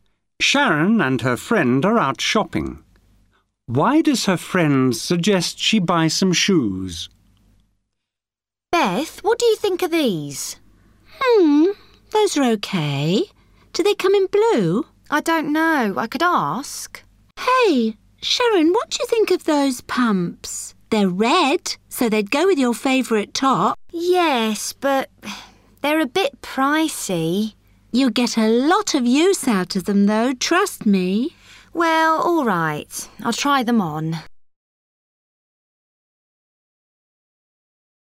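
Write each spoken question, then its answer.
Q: Why does her friend suggest she buy some shoes?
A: They would go with her favourite top and she'll get a lot of use out of them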